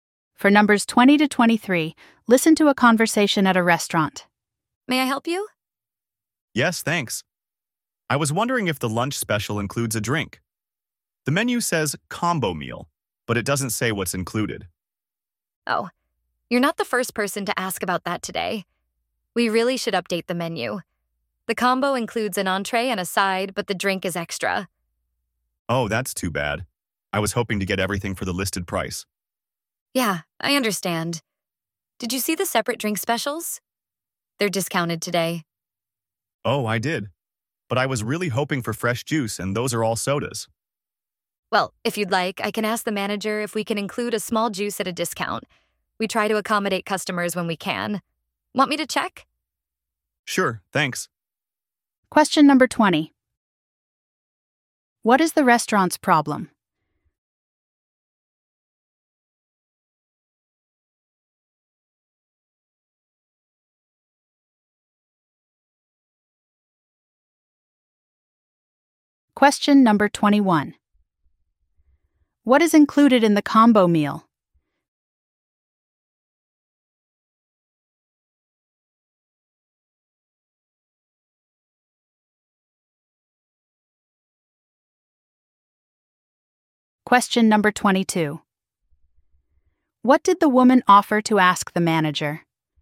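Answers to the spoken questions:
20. The menu doesn't say what is included in the combo
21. An entree and a side
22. Whether a small juice could be included at a discount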